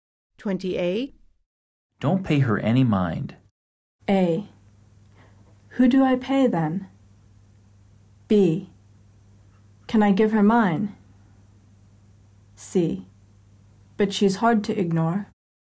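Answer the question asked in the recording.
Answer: C: But she's hard to ignore.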